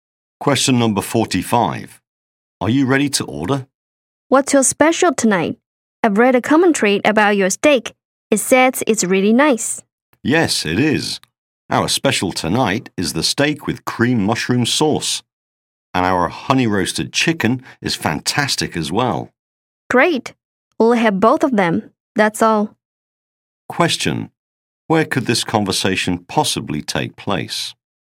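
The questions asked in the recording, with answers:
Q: Where could this conversation possibly take place?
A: In a restaurant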